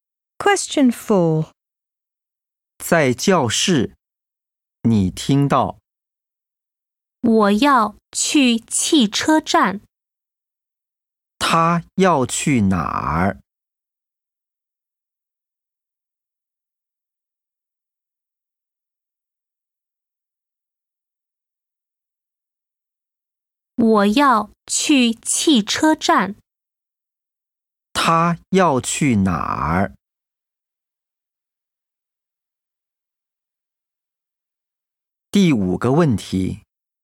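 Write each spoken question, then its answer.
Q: 他要去哪儿?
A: 汽车站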